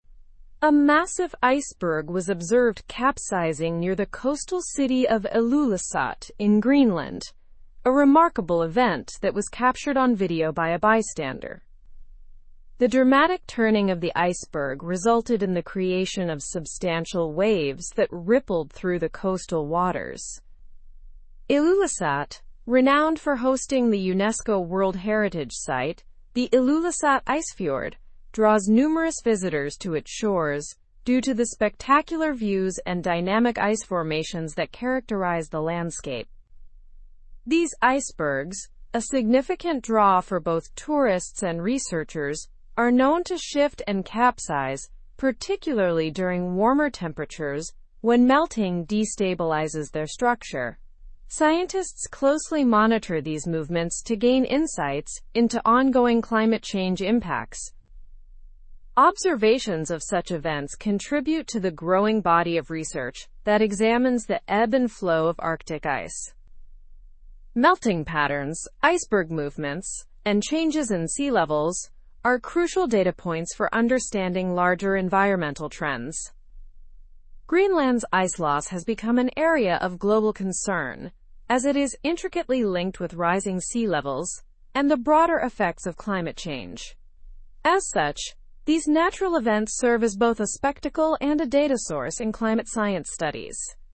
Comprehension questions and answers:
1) What event took place near Ilulissat, Greenland?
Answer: An iceberg capsized, creating significant waves.

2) Who captured the event on video?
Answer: A bystander captured the iceberg capsizing on video.

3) Why is Ilulissat an attractive location for visitors?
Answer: Ilulissat is renowned for its UNESCO World Heritage site, offering spectacular views and dynamic ice formations.

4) What causes icebergs to reposition and capsize?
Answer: Warmer temperatures lead to melting, destabilizing the icebergs.

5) Why are iceberg movements crucial to scientists?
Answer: They provide crucial data points for understanding climate change impacts.

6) What global concern is linked to Greenland's ice loss?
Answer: It is linked to rising sea levels and broader climate change effects.

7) Why do natural events in Greenland interest both scientists and tourists?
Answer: They are both a spectacle and a valuable data source for climate science studies.

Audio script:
A massive iceberg was observed capsizing near the coastal city of Ilulissat in Greenland, a remarkable event that was captured on video by a bystander. The dramatic turning of the iceberg resulted in the creation of substantial waves that rippled through the coastal waters. Ilulissat, renowned for hosting the UNESCO World Heritage site, the Ilulissat Icefjord, draws numerous visitors to its shores due to the spectacular views and dynamic ice formations that characterize the landscape. These icebergs, a significant draw for both tourists and researchers, are known to shift and capsize particularly during warmer temperatures when melting destabilizes their structure. Scientists closely monitor these movements to gain insights into ongoing climate change impacts. Observations of such events contribute to the growing body of research that examines the ebb and flow of Arctic ice. Melting patterns, iceberg movements, and changes in sea levels are crucial data points for understanding larger environmental trends. Greenland's ice loss has become an area of global concern as it is intricately linked with rising sea levels and the broader effects of climate change. As such, these natural events serve as both a spectacle and a data source in climate science studies.

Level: Level 4